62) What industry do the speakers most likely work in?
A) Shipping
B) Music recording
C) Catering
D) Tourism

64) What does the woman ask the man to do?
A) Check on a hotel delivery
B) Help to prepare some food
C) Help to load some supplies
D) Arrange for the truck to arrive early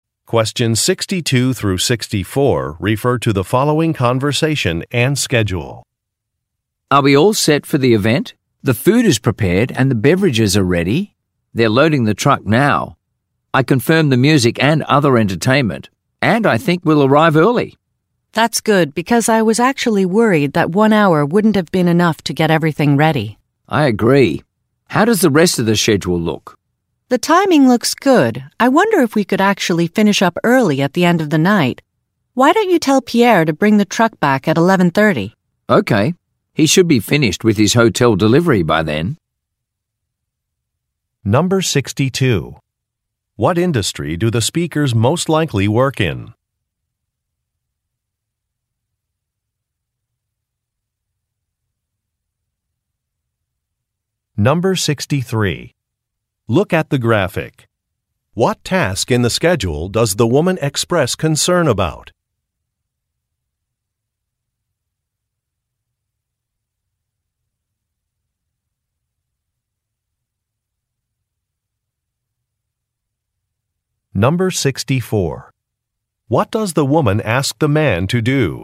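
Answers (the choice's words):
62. Catering
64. Arrange for the truck to arrive early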